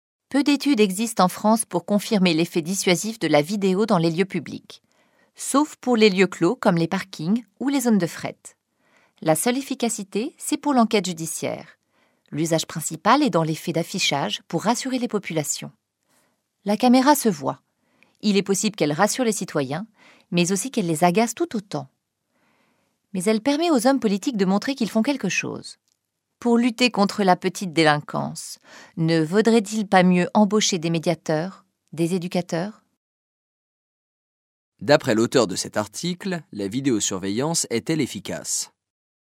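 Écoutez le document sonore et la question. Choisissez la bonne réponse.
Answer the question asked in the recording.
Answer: Seulement pour l'enquête judiciaire (et dans les lieux clos)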